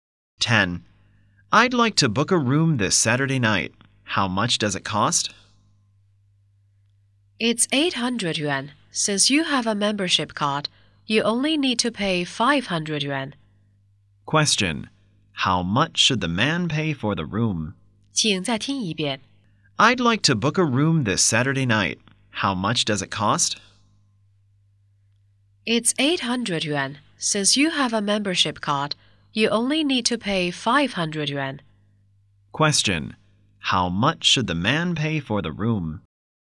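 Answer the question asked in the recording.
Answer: 500 yuan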